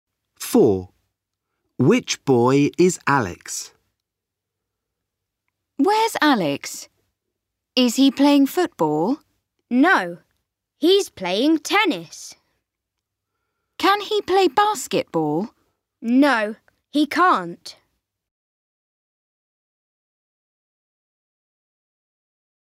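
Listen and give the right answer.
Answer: The boy playing tennis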